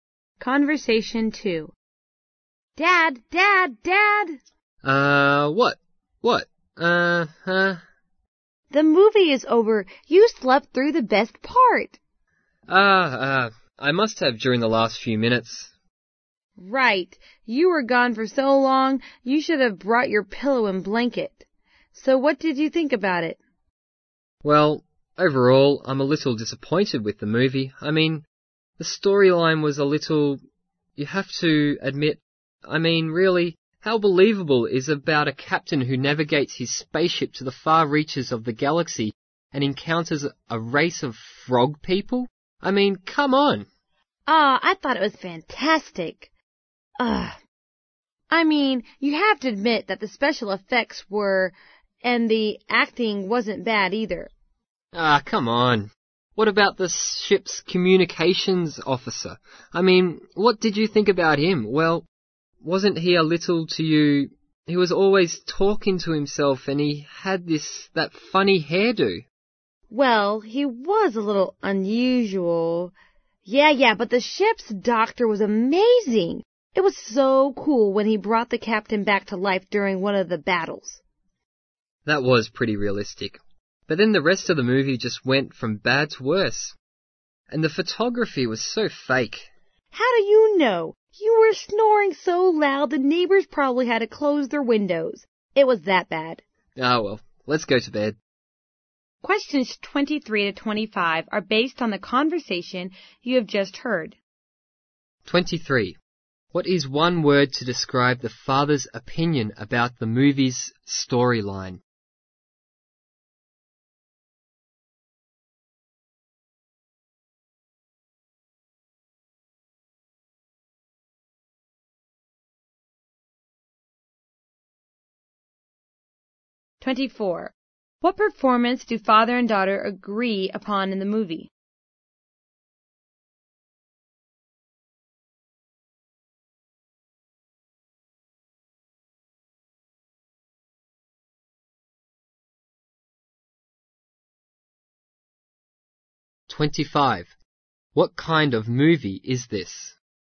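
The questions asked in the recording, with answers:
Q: What is one word to describe the father's opinion about the movie's storyline?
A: Unbelievable

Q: What performance do father and daughter agree upon in the movie?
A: The ship's doctor's

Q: What kind of movie is this?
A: A science fiction movie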